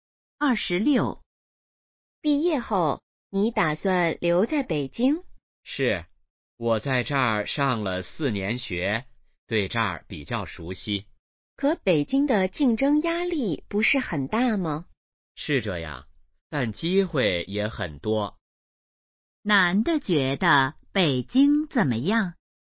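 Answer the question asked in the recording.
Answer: 机会很多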